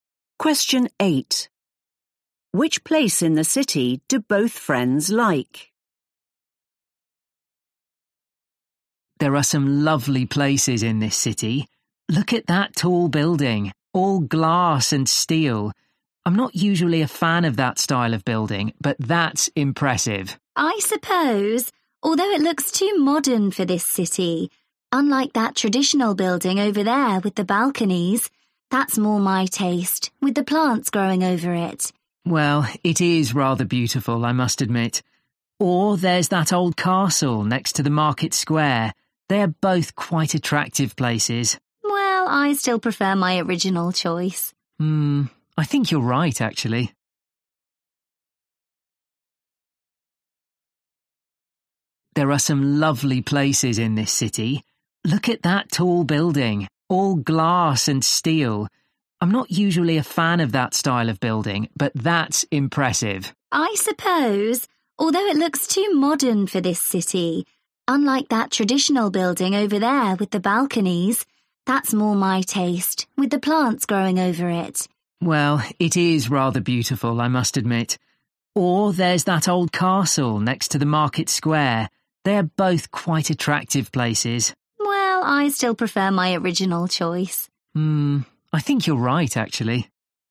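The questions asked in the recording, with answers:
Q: Which place in the city do both friends like?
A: the traditional building with balconies and plants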